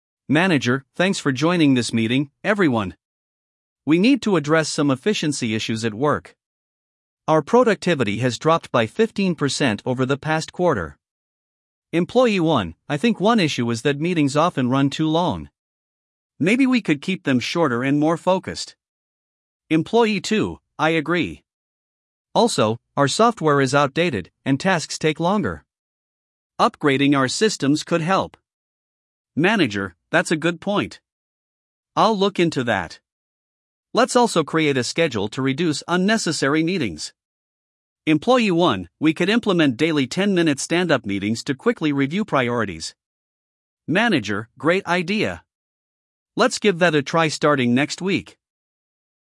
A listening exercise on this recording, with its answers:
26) What issue is being discussed?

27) How much has productivity dropped?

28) What problem does Employee 1 mention?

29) What suggestion does Employee 2 make?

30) What solution does the manager propose?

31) When will the new schedule start?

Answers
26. Workplace efficiency
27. 15%
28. Meetings run too long
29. Upgrade software
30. Shorter, focused meetings
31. Next week

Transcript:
Manager: Thanks for joining this meeting, everyone. We need to address some efficiency issues at work. Our productivity has dropped by 15% over the past quarter.
Employee 1: I think one issue is that meetings often run too long. Maybe we could keep them shorter and more focused.
Employee 2: I agree. Also, our software is outdated, and tasks take longer. Upgrading our systems could help.
Manager: That's a good point. I'll look into that. Let's also create a schedule to reduce unnecessary meetings.
Employee 1: We could implement daily 10-minute stand-up meetings to quickly review priorities.
Manager: Great idea! Let's give that a try starting next week.